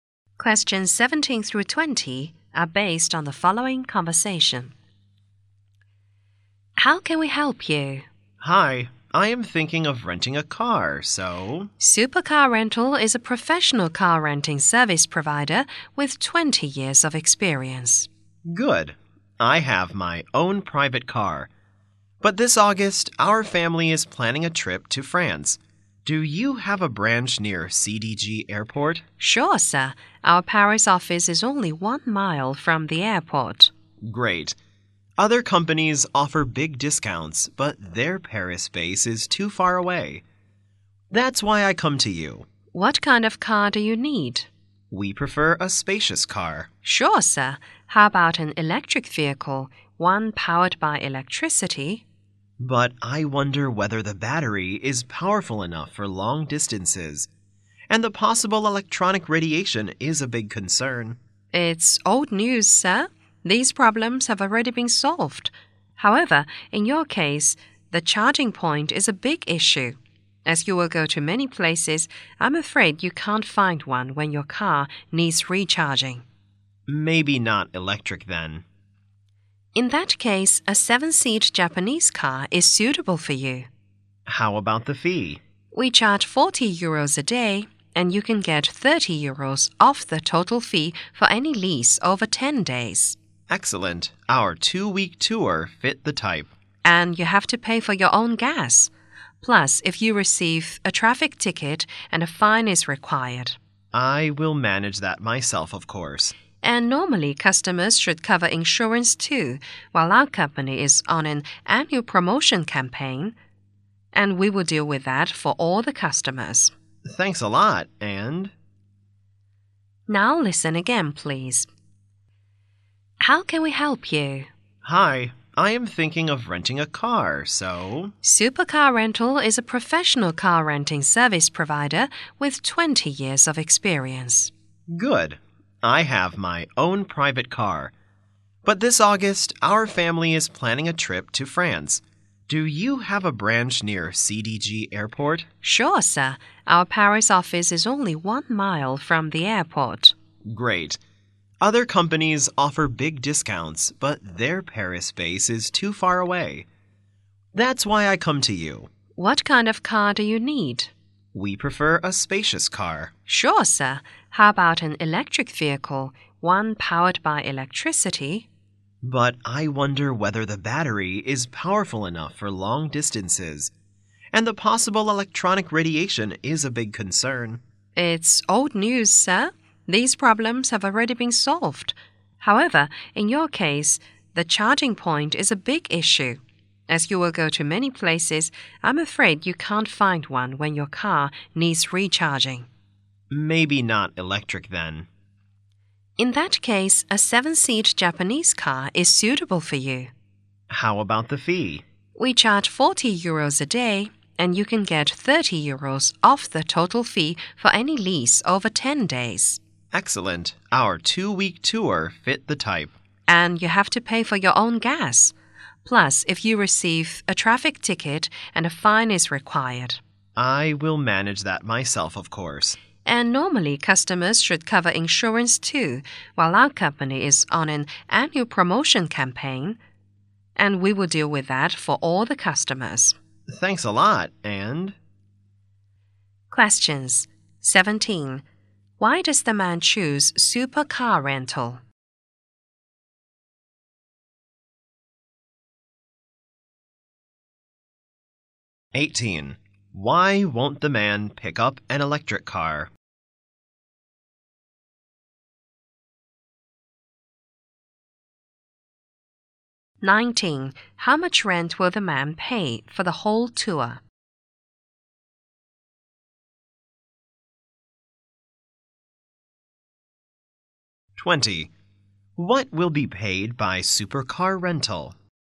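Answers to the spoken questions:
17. Its Paris office is near the airport
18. Charging points may be hard to find
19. 530 euros
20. The insurance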